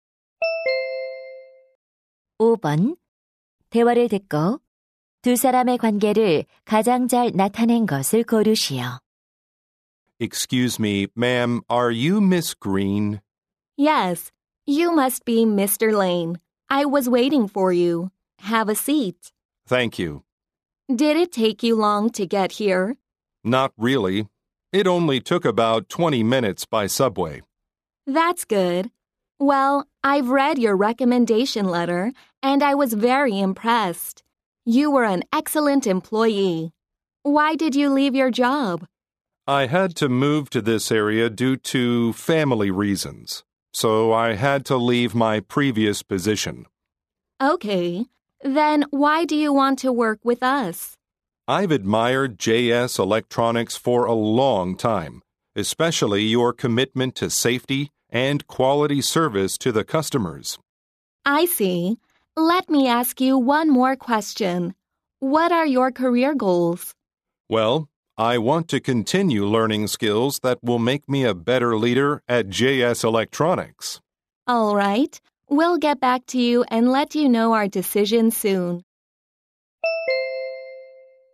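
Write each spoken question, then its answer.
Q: 대화를 듣고 두 사람의 관계를 가장 잘 나타낸 것을 고르시오.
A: 면접관 - 입사 지원자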